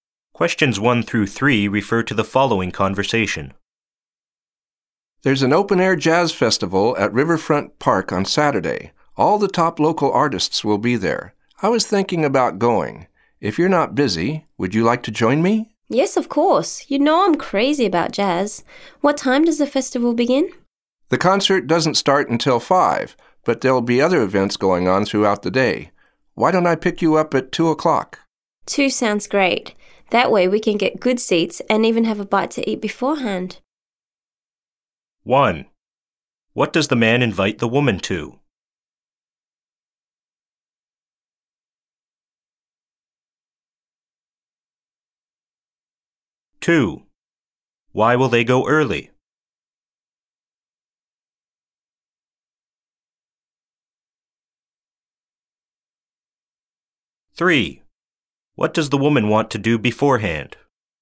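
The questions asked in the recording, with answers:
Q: What does the man invite the woman to?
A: An open-air jazz festival at Riverfront Park

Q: Why will they go early?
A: To get good seats

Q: What does the woman want to do beforehand?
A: Have a bite to eat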